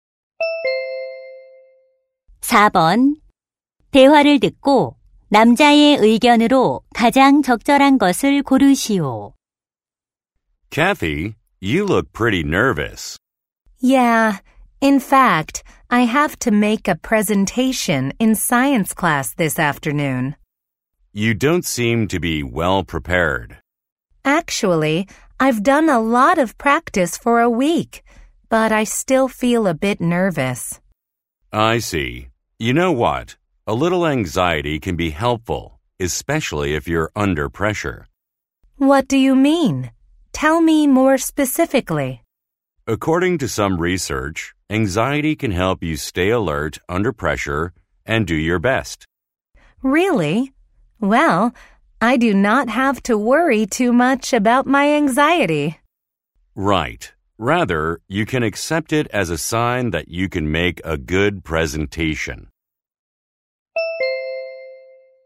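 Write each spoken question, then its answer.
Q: 대화를 듣고 남자의 의견으로 가장 적절한 것을 고르시오.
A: 약간의 불안은 발표에 도움이 될 수 있다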